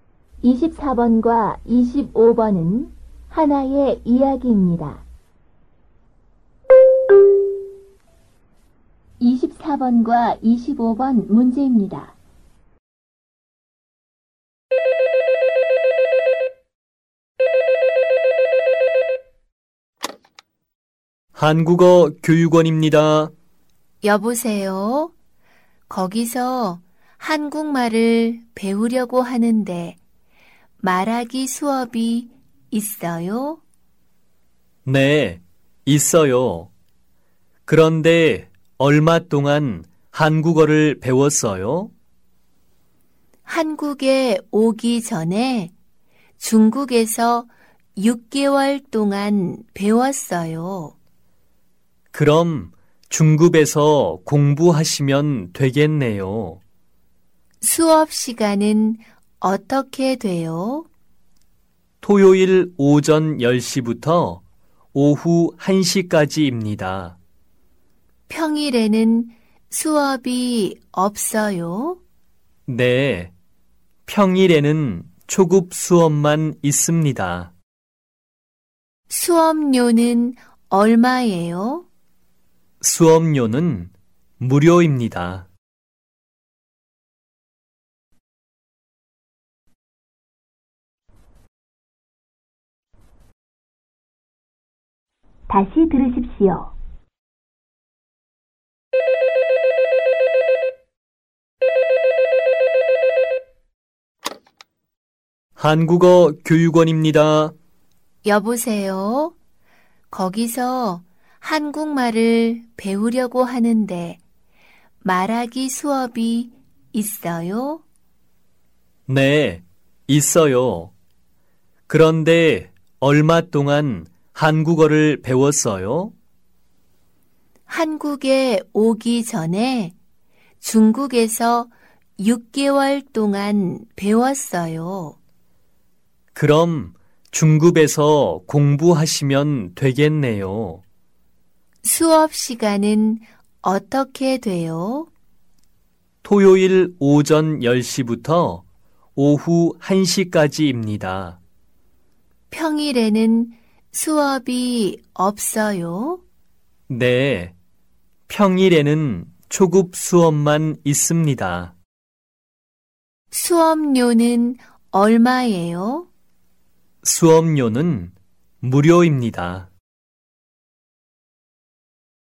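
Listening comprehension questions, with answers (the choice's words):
24번과 25번은 하나의 이야기입니다.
여자는 중국에서 얼마 동안 한국말을 배웠습니까?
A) 2개월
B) 6개월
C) 1년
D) 배운 적이 없습니다.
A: 6개월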